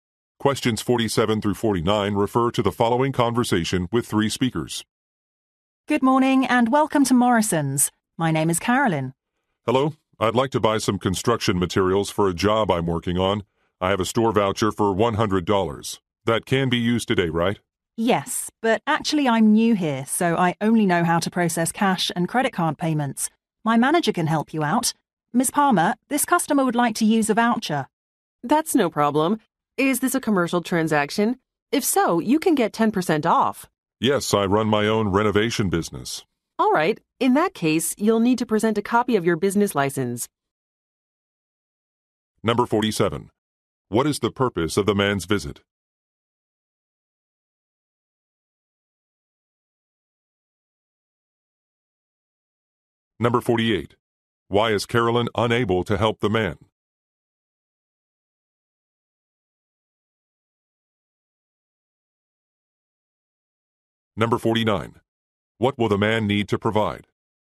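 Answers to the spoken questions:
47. To buy construction materials
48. She is new and only knows how to process cash and credit card payments
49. A copy of his business license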